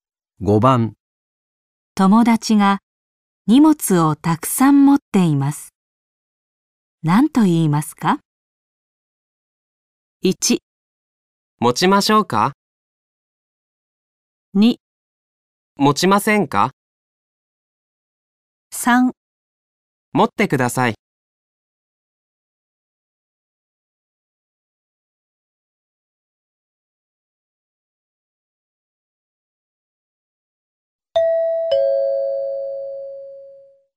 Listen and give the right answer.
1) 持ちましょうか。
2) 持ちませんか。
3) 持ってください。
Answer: 1) 持ちましょうか。

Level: N5 Listening · Test 3